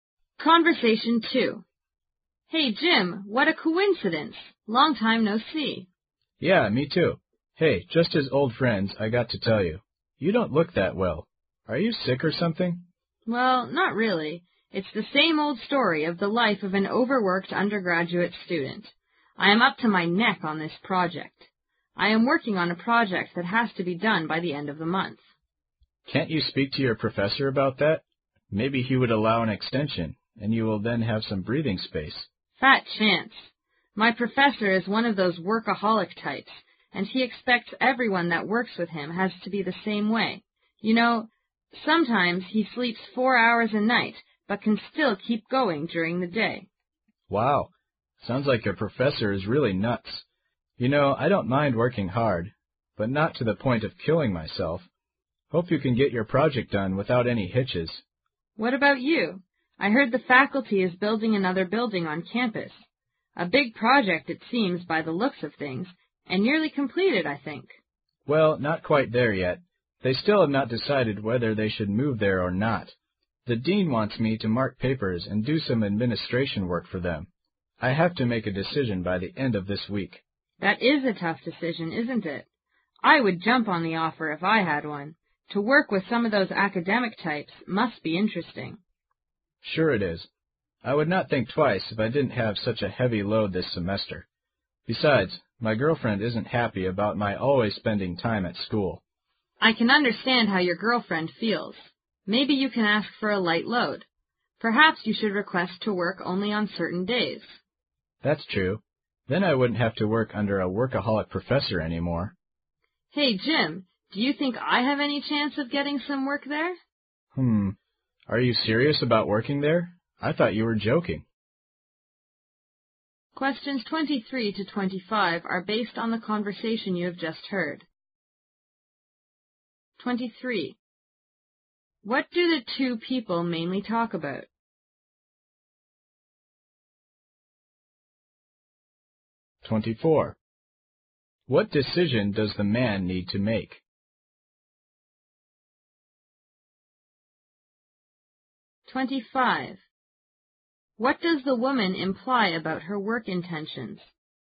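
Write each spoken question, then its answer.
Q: What decision does the man need to make?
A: Whether to accept the dean's offer to mark papers and do administration work

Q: What does the woman imply about her work intentions?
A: She would like to get work there too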